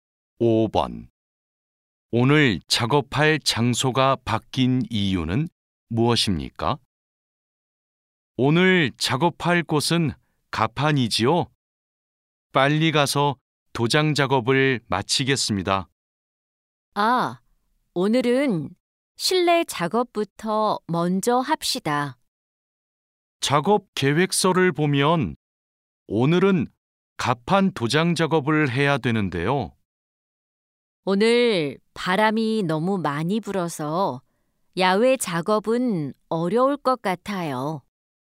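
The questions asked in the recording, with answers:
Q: 오늘 작업할 장소가 바뀐 이유는 무엇입니까?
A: 바람이 너무 많이 불어서 야외 작업이 어렵기 때문에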